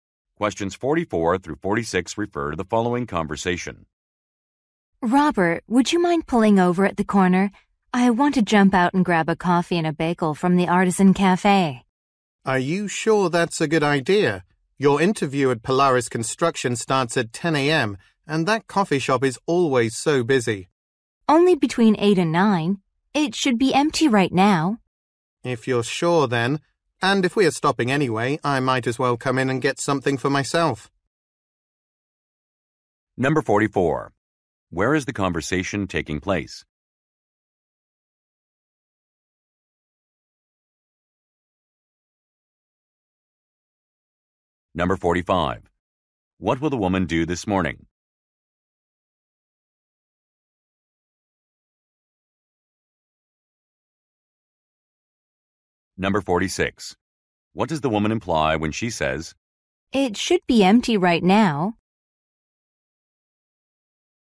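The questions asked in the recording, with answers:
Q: Where is the conversation taking place?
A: In a car

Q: What will the woman do this morning?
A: Attend a job interview

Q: What does the woman imply when she says,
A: The cafe won't be busy, so there is time to stop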